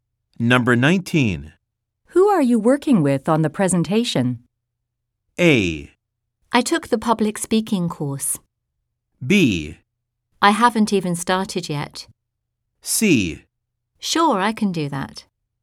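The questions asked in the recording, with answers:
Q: Who are you working with on the presentation?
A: B: I haven't even started yet.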